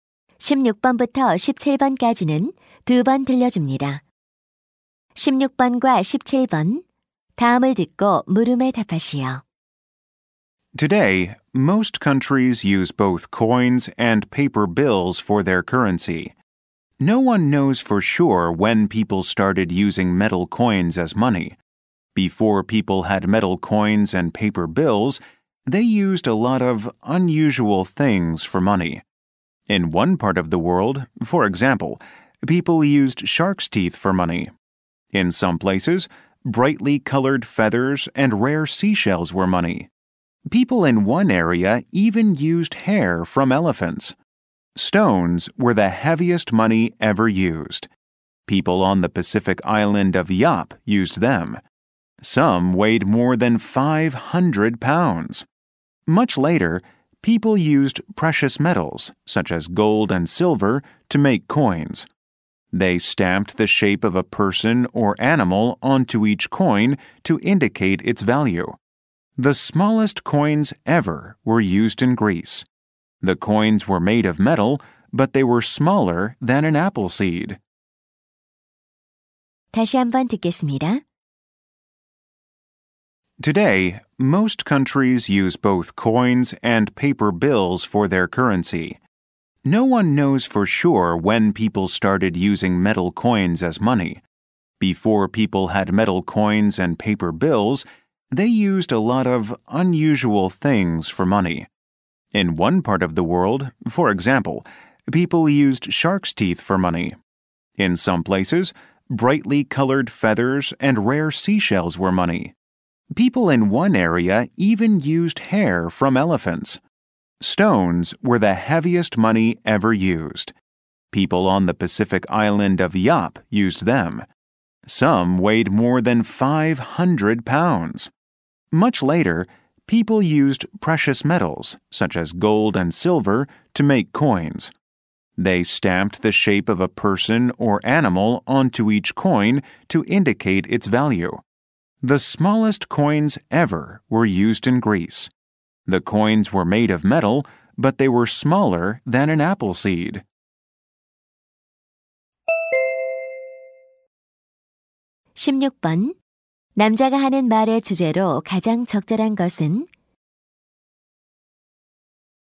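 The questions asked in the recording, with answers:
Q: 남자가 하는 말의 주제로 가장 적절한 것은?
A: 과거에 화폐로 사용된 특이한 물건들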